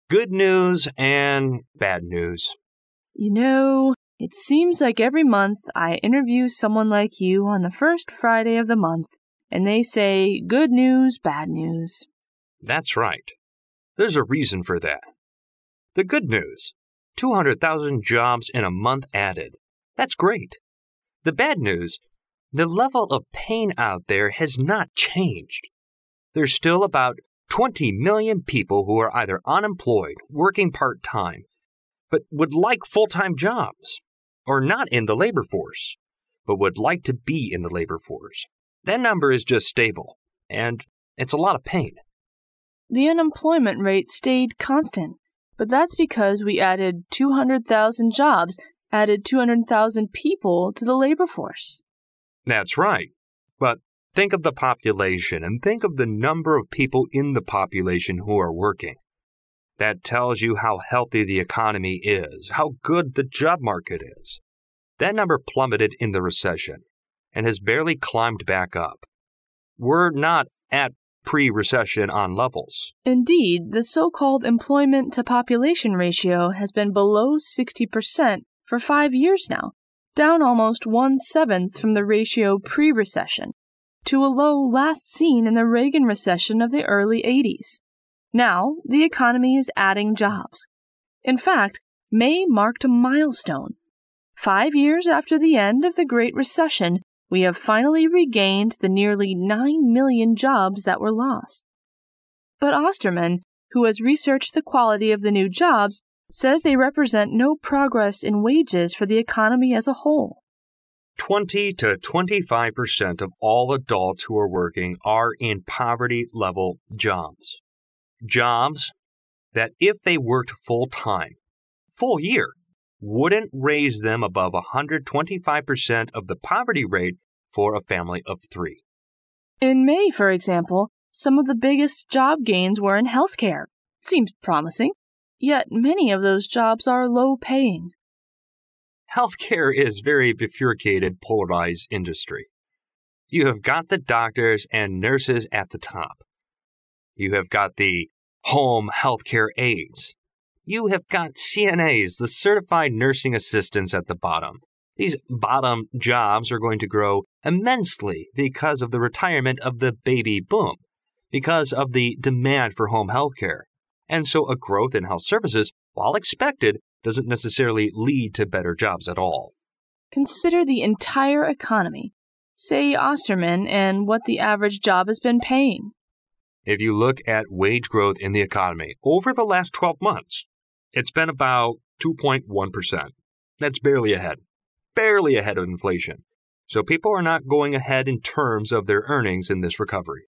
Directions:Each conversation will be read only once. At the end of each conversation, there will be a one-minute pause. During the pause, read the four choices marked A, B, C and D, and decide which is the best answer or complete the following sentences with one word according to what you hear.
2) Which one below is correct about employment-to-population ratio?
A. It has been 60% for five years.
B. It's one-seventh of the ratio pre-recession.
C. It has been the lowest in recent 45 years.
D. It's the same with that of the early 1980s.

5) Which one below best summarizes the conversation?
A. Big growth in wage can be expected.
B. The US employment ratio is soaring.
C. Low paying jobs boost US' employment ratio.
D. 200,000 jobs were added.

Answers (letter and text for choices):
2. C. It has been the lowest in recent 45 years.
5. C. Low paying jobs boost US' employment ratio.

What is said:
Interviewee (I): Good news and bad news.
Reporter (R): You know, it seems like every month, I interview someone like you on the first Friday of the month, and they say, good news, bad news.
I: That's right. There's a reason for that, the good news, 200,000 jobs in a month added. That's great. The bad news, the level of pain out there has not changed. There's still about 20 million people who are either umemployed, working part time, but would like full-time jobs, or not in the labor force, but would like to be in the labor force. That number is just stable, and it's a lot of pain.
R: The unemployment rate stayed constant, but that's because we added 200,000 jobs, added 200,000 people to the labor force.
I: That's right. But think of the population and think of the number of people in the population who are working. That tells you how healthy the economy is, how good the job market is. That number plummeted in the recession, and has barely climbed back up. We're not at pre-recession on levels.
R: Indeed the so-called employment-to-population ratio has been below 60 percent for five years now, down almost one-seventh from the ratio pre-recession, to a low last seen in the Reagan recession of the early 80's. Now, the economy is adding jobs. In fact, May marked a milestone. Five years after the end of the great recession, we have finally regained the nearly nine million jobs that were lost. But Osterman, who has researched the quality of the new jobs, says they represent no progress in wages for the economy as a whole.
I: Twenty to 25 percent of all adults who are working are in poverty level jobs, jobs that if they worked full-time, full year, wouldn't raise them above 125 percent of the poverty rate for a family of three.
R: In May, for example, some of the biggest job gains were in health care. Seems promising. Yet many of those jobs are low-paying.
I: Health care is very bifurcated, polarized industry. You have got the doctors and nurses at the top. You have got CNAs, the certified nursing assistants, at the bottom. These bottom jobs are going to grow immensely because of the retirement of the baby boom, because of the demand for home health care. And so a growth in health services, while expected, doesn't necessarily lead to better jobs at all.
R: "Consider the entire economy", say Osterman, "and what the average job has been paying."
I: If you look at wage growth in the economy, over the last 12 months, it's been about 2.1 percent. That's barely ahead, barely ahead of inflation, so people are not going ahead in terms of their earnings in this recovery.